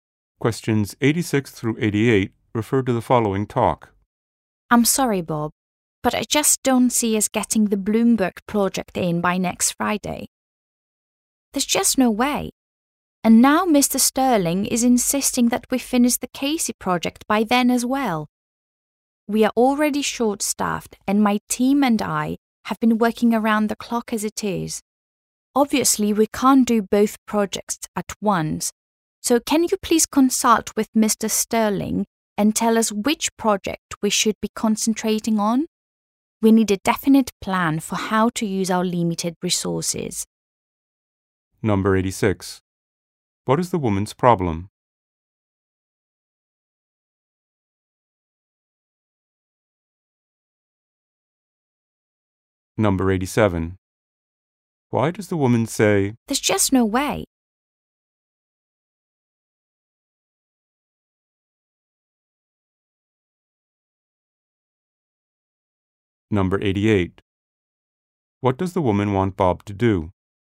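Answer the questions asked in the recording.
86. She can't finish two projects by next Friday
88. Ask Mr. Sterling which project to concentrate on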